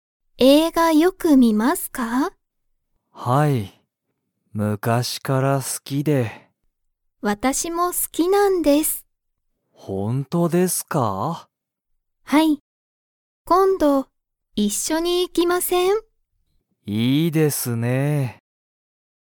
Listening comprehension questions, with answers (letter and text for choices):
山田やまださんと鈴木すずきさんは、____映画えいがに行いく。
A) 昔むかしの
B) 最近さいきんあまり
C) 今度一緒こんどいっしょに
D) この後あと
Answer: C) 今度一緒こんどいっしょに

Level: Level 1